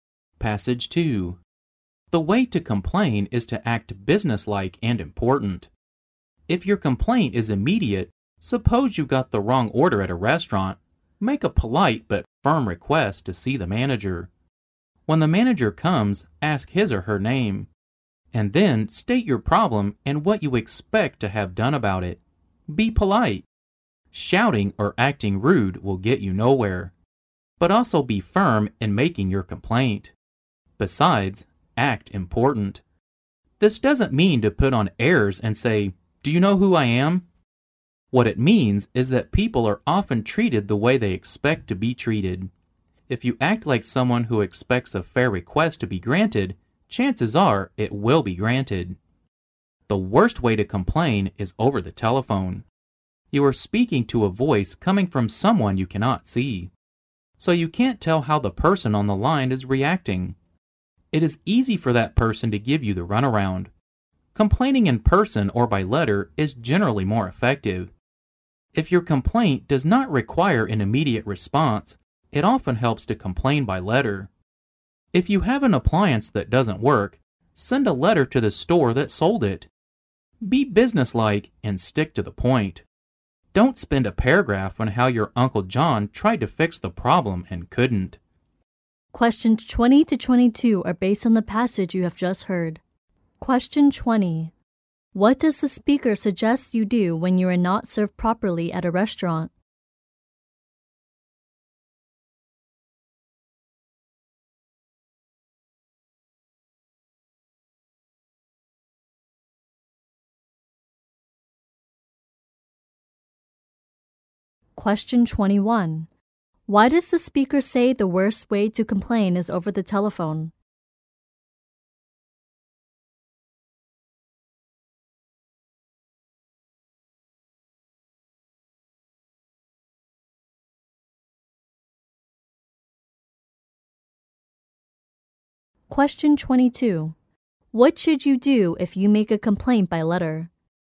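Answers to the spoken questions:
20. Politely but firmly ask to see the manager.
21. You can't see how the other person is reacting, so they can easily give you the runaround.
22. Be businesslike and stick to the point.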